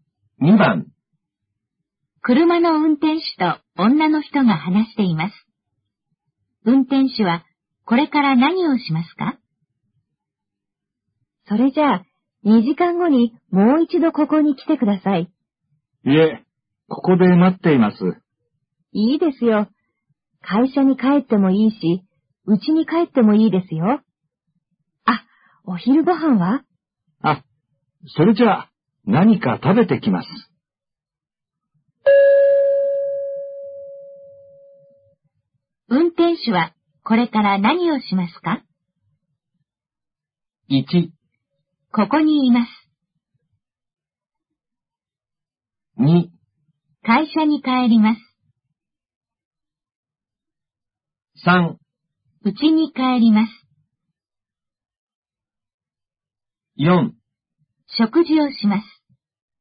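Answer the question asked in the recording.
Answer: 4: 食事をします。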